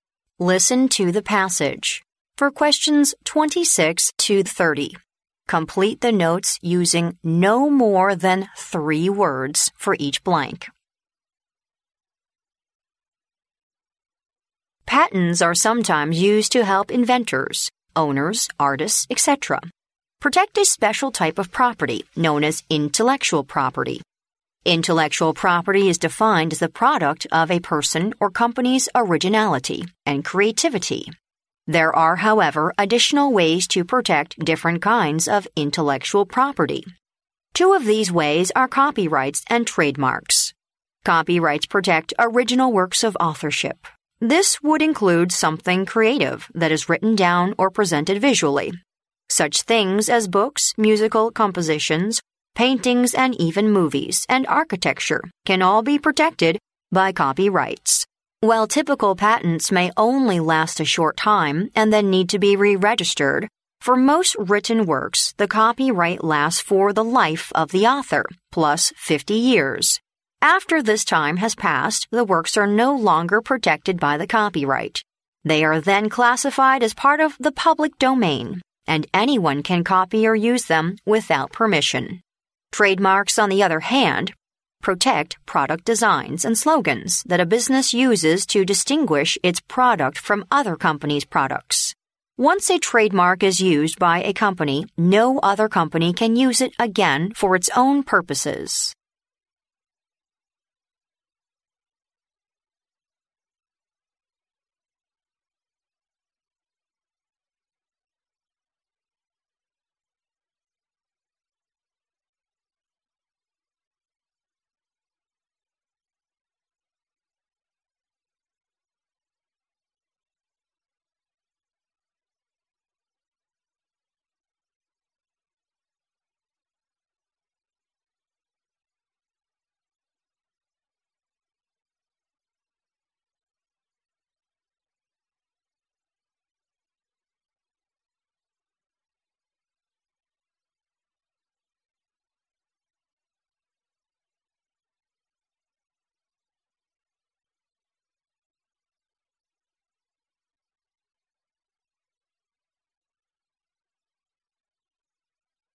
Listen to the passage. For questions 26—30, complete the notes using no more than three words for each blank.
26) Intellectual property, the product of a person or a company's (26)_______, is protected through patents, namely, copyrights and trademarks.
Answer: originality and creativity

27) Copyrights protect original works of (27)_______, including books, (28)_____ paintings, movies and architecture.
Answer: authorship

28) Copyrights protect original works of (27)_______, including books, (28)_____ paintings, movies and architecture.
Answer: musical compositions

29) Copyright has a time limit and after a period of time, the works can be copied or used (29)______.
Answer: without permission

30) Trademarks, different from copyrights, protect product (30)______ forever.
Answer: designs and slogans

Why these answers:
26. 录音中提到知识产权被定义为"the product of a person or company's originality and creativity",即个人或公司创新与创造的产品。因此该空应填originally and creativity。
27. 录音中提到著作权保护"original works of authorship",即原作者的原创作品。因此该空应填authorship。
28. 录音中提到著作权保护books, musical compositions, paintings, movies and architecture等原创作品。因此该空应填musical compositions。
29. 录音中提到当作品超过著作权保护年限时,任何人都可以"copy or use them without permission"。因此该空应填without permission。
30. 录音中提到商标与著作权不同,"protect product designs and slogans",而且一旦被一个公司使用,其他公司便不能私自使用。因此该空应填designs and slogans。

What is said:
Patents are sometimes used to help inventors, owners, artists, etc. protect a special type of property known as "intellectual property". Intellectual property is defined as "the product of a person or company's originality and creativity". There are, however, additional ways to protect different kinds of intellectual property. Two of these ways are copyrights and trademarks. Copyrights protect "original works of authorship". This would include something creative that is written down or presented visually. Such things as books, musical compositions, paintings, and even movies and architecture can all be protected by copyrights. While typical patents may only last a short time and then need to be re-registered, for most written works, the copyright lasts for the life of the author plus 50 years. After this time has passed, the works are no longer protected by the copyright. They are then classified as part of the "public domain", and anyone can copy or use them without permission. Trademarks, on the other hand, protect product designs and slogans that a business uses to distinguish its product from other companies' products. Once a trademark is used by a company, no other company can use it again for its own purposes.